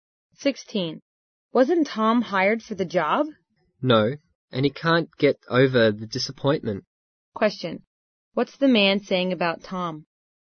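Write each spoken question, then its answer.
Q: What's the man saying about Tom?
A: Tom is still very disappointed about not getting the job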